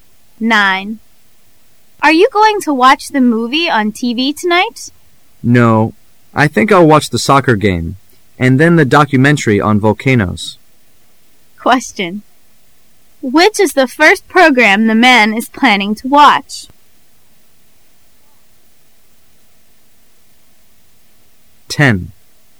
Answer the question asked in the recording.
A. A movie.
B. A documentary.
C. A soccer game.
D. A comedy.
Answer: C. A soccer game.

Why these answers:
W: Are you going to watch the movie on TV tonight? M: No, I think I' 11 watch the soccer game and then the documentary on volcanoes. Q: Which is the first program the man is planning to watch? [试题分析]本题考查对文中信息的理解和辨识。 [关键词语]watch the soccer game,then,the documentary on volcanoes. [详细解答]the man回答说他今晚不看电视上播放的电影,但他首先要看足球赛,再看有关火山的记录片。故答案应为C。